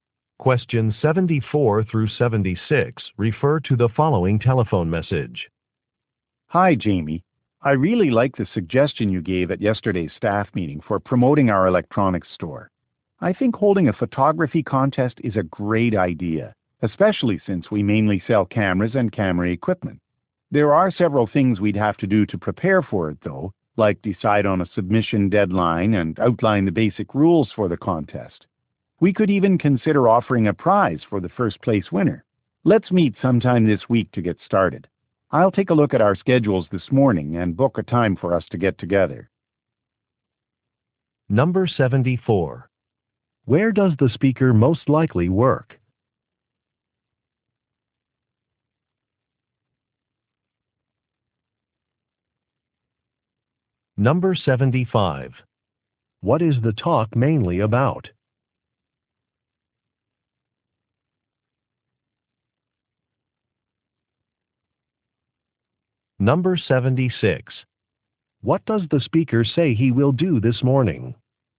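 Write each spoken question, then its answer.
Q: Where does the speaker most likely work?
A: At an electronics store

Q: What is the talk mainly about?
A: Planning a photography contest

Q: What does the speaker say he will do this morning?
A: Check schedules and book a meeting time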